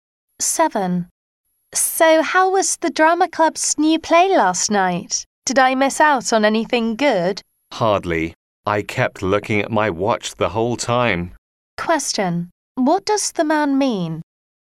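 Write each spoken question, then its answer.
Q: What does the man mean?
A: The play was boring.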